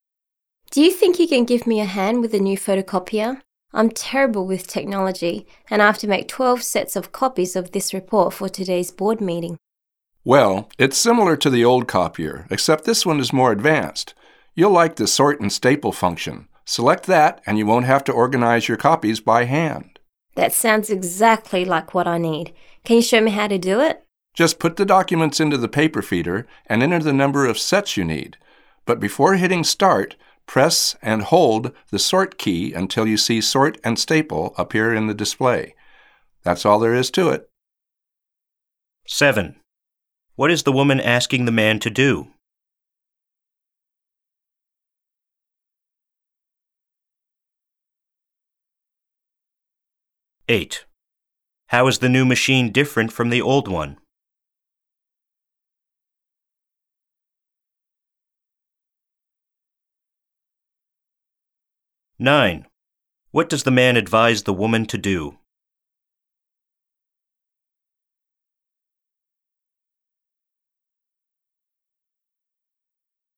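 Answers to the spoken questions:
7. Help her use the new photocopier
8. It is more advanced, with a sort and staple function
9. Press and hold the Sort key until Sort and Staple appears before hitting Start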